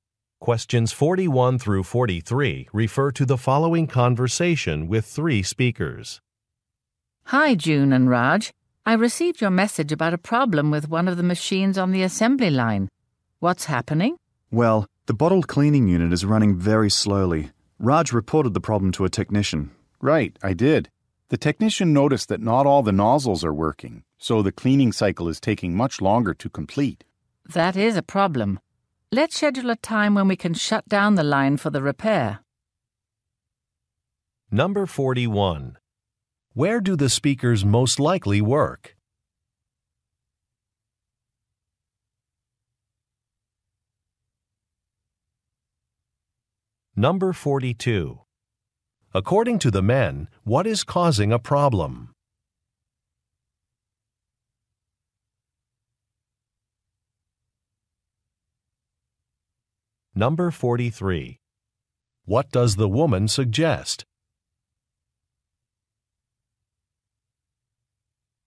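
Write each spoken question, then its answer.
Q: Where do the speakers most likely work?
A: At a factory with a bottling assembly line

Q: According to the men, what is causing a problem?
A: Some nozzles are not working

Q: What does the woman suggest?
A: Scheduling a time to shut down the line for repair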